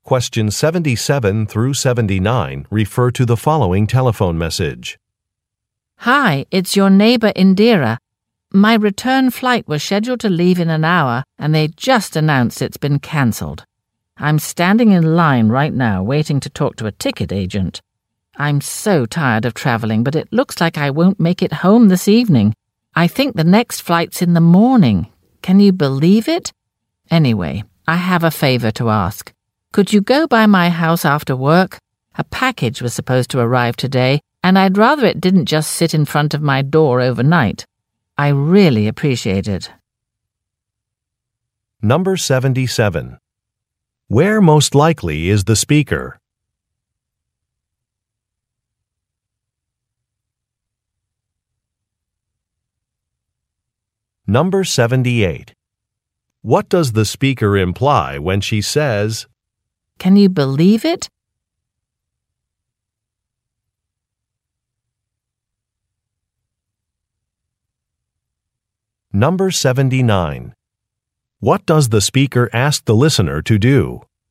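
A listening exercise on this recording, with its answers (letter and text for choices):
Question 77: Where most likely is the speaker?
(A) At her house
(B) At an airport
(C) In a taxi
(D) On a train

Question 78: What does the speaker imply when she says, "Can you believe it"?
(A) She is annoyed.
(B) She is excited.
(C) She is embarrassed.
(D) She is confused.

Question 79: What does the speaker ask the listener to do?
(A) Lock a door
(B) Check an address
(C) Meet a colleague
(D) Pick up a package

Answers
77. (B) At an airport
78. (A) She is annoyed.
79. (D) Pick up a package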